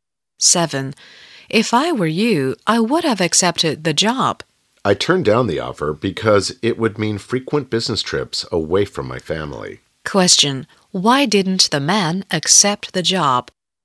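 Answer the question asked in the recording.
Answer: It would mean frequent business trips away from his family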